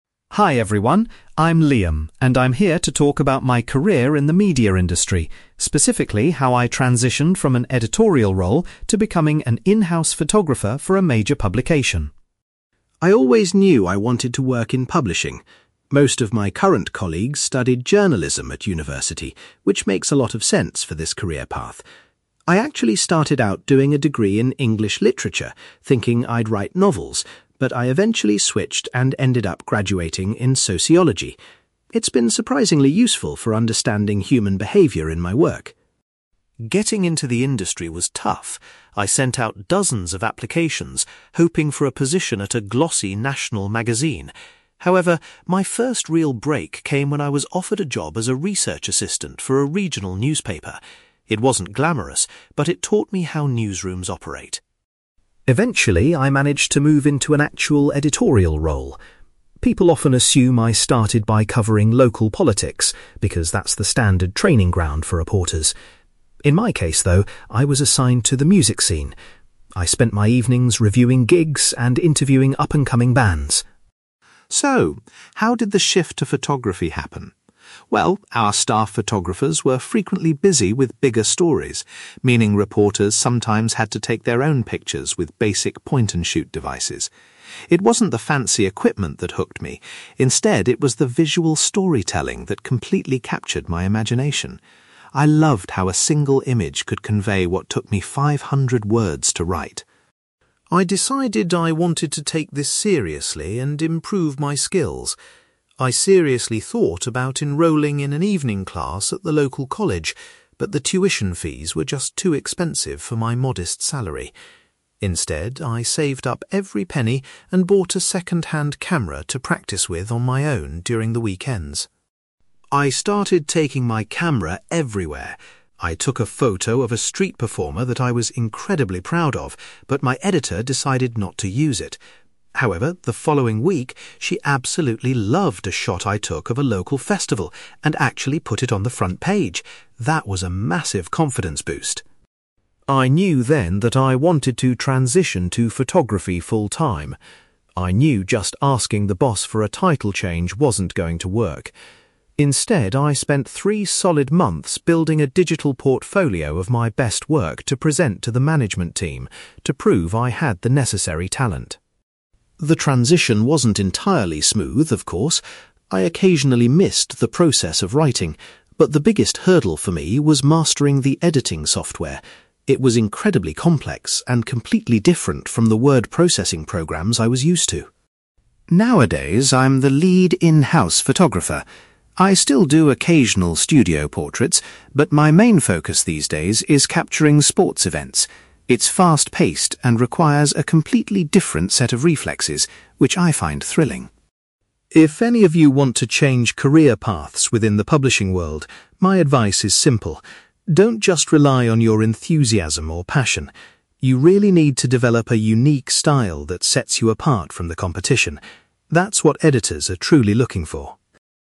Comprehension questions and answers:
You will hear a man called Liam talking about his transition from a journalist to a professional photographer. For questions 9-18, complete the sentences with a word or short phrase.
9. Unlike many of his colleagues, Liam obtained a university qualification in (9)........................... rather than journalism or literature.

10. Liam was initially hired to work as a (10)........................... at a regional publication.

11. Instead of local politics, Liam's early editorial responsibilities involved covering the (11)........................... .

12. Liam explains that he was drawn to photography by the appeal of (12)........................... .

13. Because he couldn't afford formal classes, Liam invested in a (13)........................... to practice his skills.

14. An image Liam captured at a (14)........................... was the first to make it onto the newspaper's front page.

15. In order to demonstrate his abilities to his bosses, Liam put together a (15)........................... .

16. According to Liam, getting used to the (16)........................... proved to be the most difficult part of his career change.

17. In his current position, Liam concentrates mostly on taking pictures of (17)........................... .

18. Liam suggests that aspiring professionals must establish a (18)........................... to stand out from others.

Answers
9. sociology
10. research assistant
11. music scene
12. visual storytelling
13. second-hand camera
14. local festival
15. digital portfolio
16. editing software
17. sports events
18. unique style

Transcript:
Liam: Hi everyone, I'm Liam, and I'm here to talk about my career in the media industry, specifically how I transitioned from an editorial role to becoming an in-house photographer for a major publication.
I always knew I wanted to work in publishing. Most of my current colleagues studied journalism at university, which makes a lot of sense for this career path. I actually started out doing a degree in English literature, thinking I'd write novels, but I eventually switched and ended up graduating in sociology. It's been surprisingly useful for understanding human behaviour in my work.
Getting into the industry was tough. I sent out dozens of applications, hoping for a position at a glossy national magazine. However, my first real break came when I was offered a job as a research assistant for a regional newspaper. It wasn't glamorous, but it taught me how newsrooms operate.
Eventually, I managed to move into an actual editorial role. People often assume I started by covering local politics because that's the standard training ground for reporters. In my case, though, I was assigned to the music scene. I spent my evenings reviewing gigs and interviewing up-and-coming bands.
So, how did the shift to photography happen? Well, our staff photographers were frequently busy with bigger stories, meaning reporters sometimes had to take their own pictures with basic point-and-shoot devices. It wasn't the fancy equipment that hooked me; instead, it was the visual storytelling that completely captured my imagination. I loved how a single image could convey what took me five hundred words to write.
I decided I wanted to take this seriously and improve my skills. I seriously thought about enrolling in an evening class at the local college, but the tuition fees were just too expensive for my modest salary. Instead, I saved up every penny and bought a second-hand camera to practice with on my own during the weekends.
I started taking my camera everywhere. I took a photo of a street performer that I was incredibly proud of, but my editor decided not to use it. However, the following week, she absolutely loved a shot I took of a local festival and actually put it on the front page. That was a massive confidence boost!
I knew then that I wanted to transition to photography full-time. I knew just asking the boss for a title change wasn't going to work. Instead, I spent three solid months building a digital portfolio of my best work to present to the management team, to prove I had the necessary talent.
The transition wasn't entirely smooth, of course. I occasionally missed the process of writing, but the biggest hurdle for me was mastering the editing software. It was incredibly complex and completely different from the word processing programs I was used to.
Nowadays, I'm the lead in-house photographer. I still do occasional studio portraits, but my main focus these days is capturing sports events. It's fast-paced and requires a completely different set of reflexes, which I find thrilling.
If any of you want to change career paths within the publishing world, my advice is simple. Don't just rely on your enthusiasm or passion. You really need to develop a unique style that sets you apart from the competition. That's what editors are truly looking for.

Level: B2